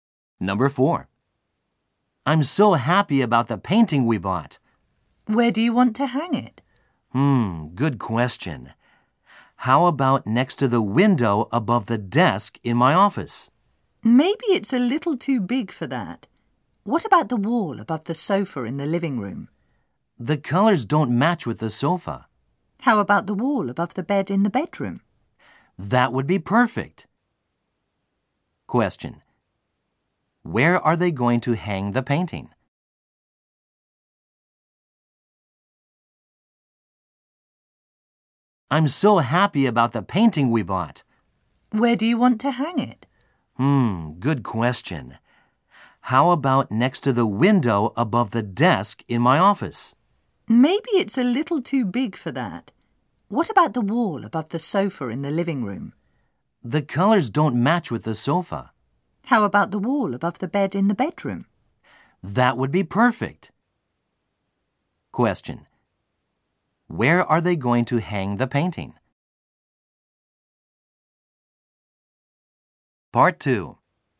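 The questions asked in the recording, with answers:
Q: Where are they going to hang the painting?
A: On the wall above the bed in the bedroom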